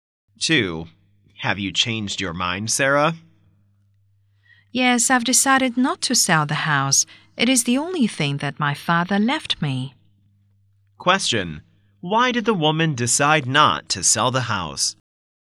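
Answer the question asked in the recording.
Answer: It is the only thing her father left her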